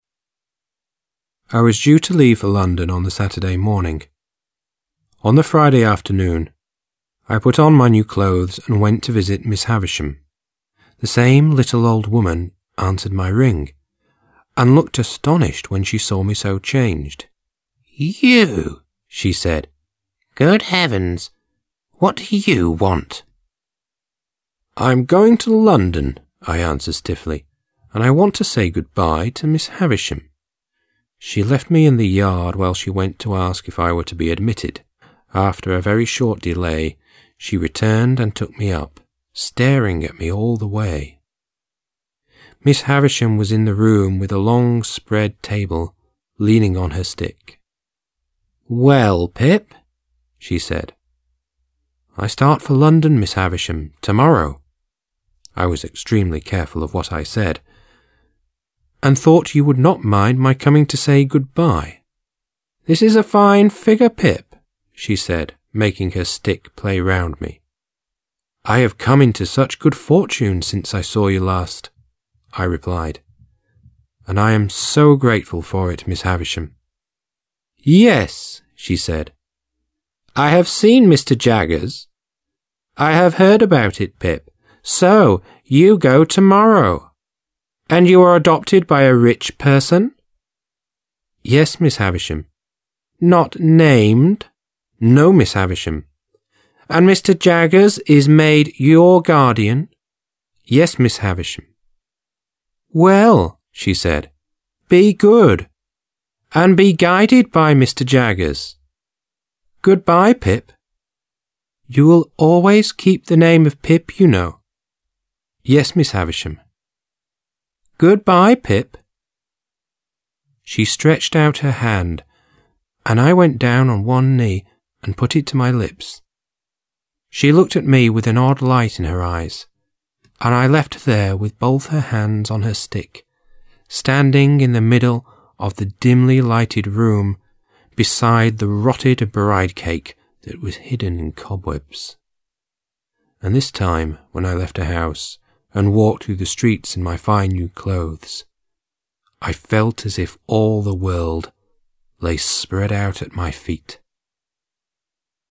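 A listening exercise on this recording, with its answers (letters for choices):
Task 3. Listen to the track 7_03 and decide who these statements belong to ...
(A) Miss Havisham (Miss H)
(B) Pip (P)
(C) housemaid (H)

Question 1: "Good heavens!"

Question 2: "I start for London"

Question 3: "This is a fine figure"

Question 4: "I have seen Mr. Jaggers. I have heard about it"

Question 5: "Mr. Jaggers is made your guardian"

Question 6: "I was extremely careful of what I said"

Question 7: "What do you want?"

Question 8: "I want to say good-bye"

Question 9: "I am so grateful"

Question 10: "And you are adopted by a rich person?"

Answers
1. C
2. B
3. A
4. A
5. A
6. B
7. C
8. B
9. B
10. A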